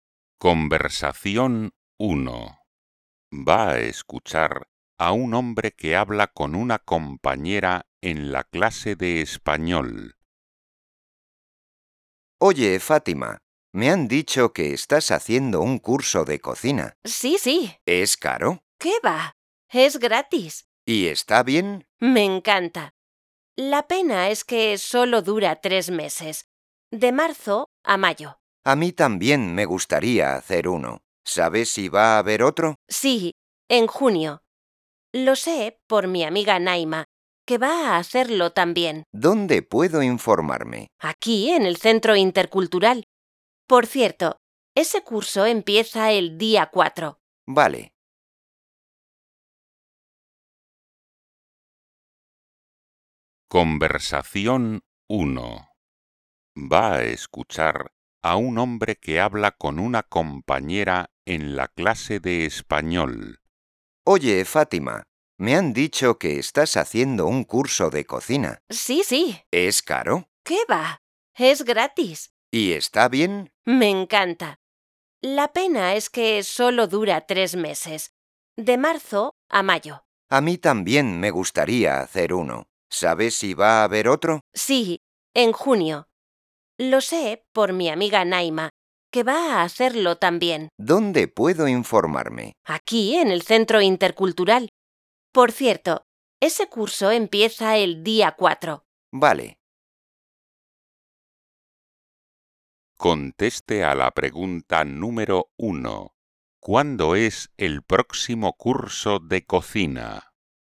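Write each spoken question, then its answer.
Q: ¿Cuándo es el próximo curso de cocina?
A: En junio, el día 4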